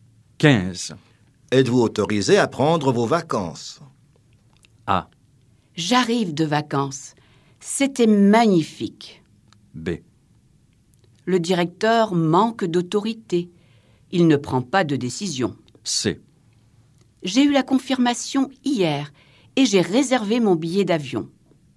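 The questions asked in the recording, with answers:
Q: Êtes-vous autorisé à prendre vos vacances?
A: C: J'ai eu la confirmation hier et j'ai réservé mon billet d'avion.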